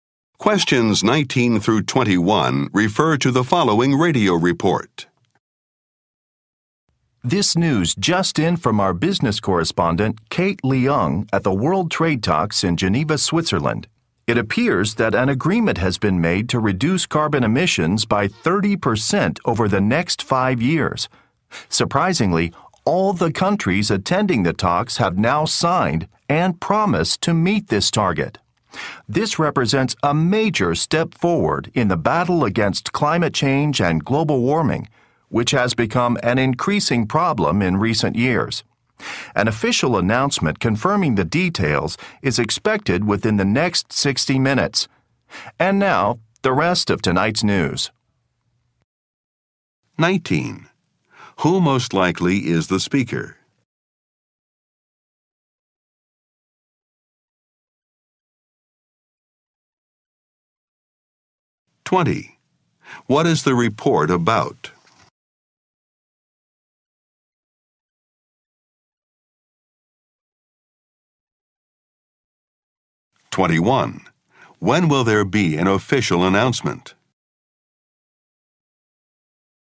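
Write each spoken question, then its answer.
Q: Who most likely is the speaker?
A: A news reporter

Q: What is the report about?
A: An agreement to reduce carbon emissions

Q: When will there be an official announcement?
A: Within the next 60 minutes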